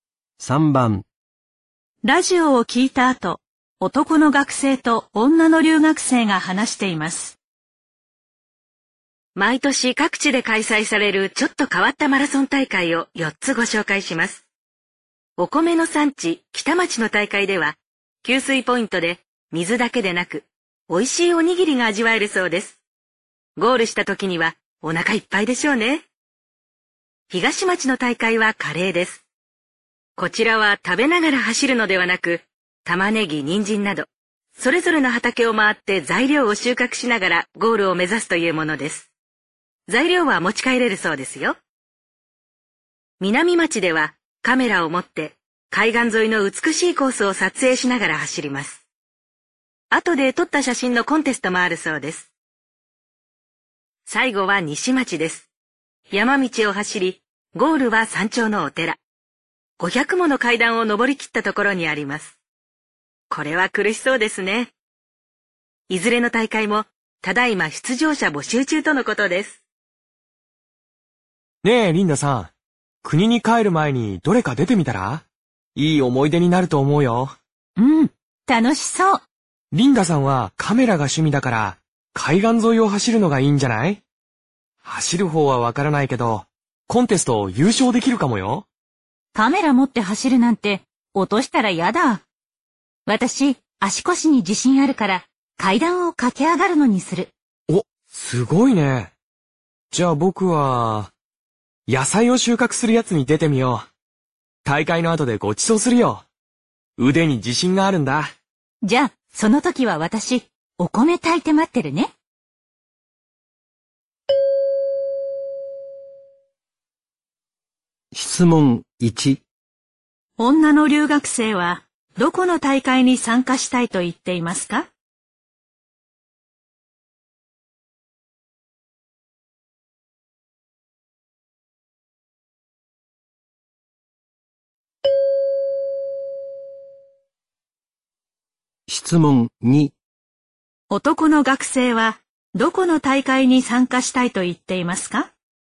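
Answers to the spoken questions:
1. 西町の大会
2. 東町の大会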